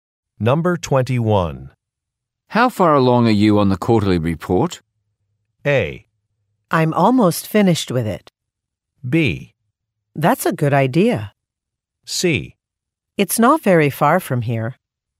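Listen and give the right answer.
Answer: A: I'm almost finished with it.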